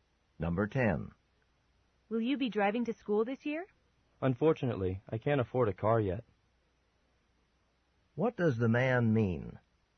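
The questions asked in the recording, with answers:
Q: What does the man mean?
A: He won't drive because he can't afford a car.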